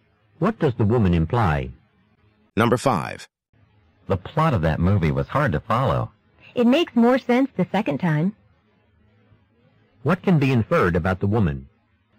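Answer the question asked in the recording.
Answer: She has seen the movie more than once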